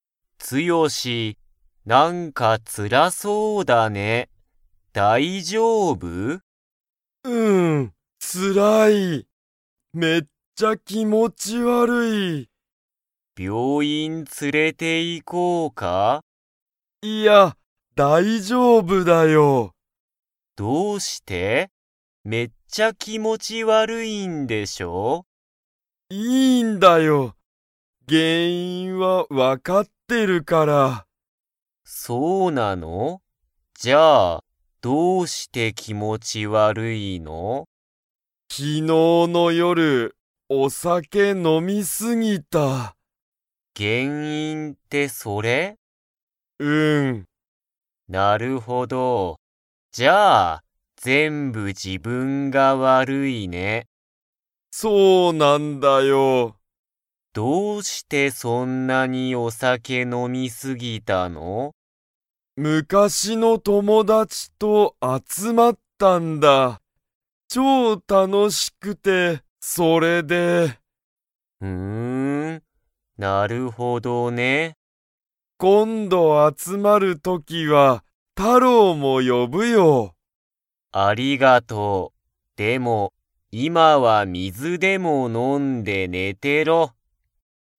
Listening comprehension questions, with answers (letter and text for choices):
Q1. ツヨシは病院びょういんに 。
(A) 行いく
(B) 行いかない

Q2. タロウが気持きもち悪わるい原因げんいんは何なんですか?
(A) 仕事しごと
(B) ごはん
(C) お酒さけ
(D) 水みず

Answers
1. (B) 行いかない
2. (C) お酒さけ

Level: Level 3